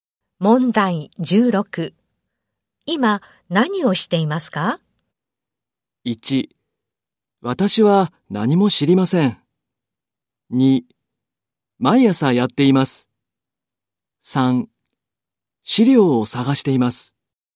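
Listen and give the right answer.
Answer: 3: 資料を探しています。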